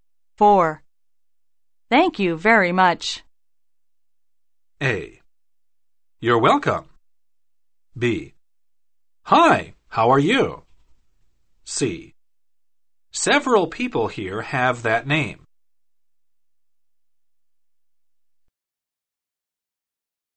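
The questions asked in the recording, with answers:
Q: Thank you very much.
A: A: You're welcome.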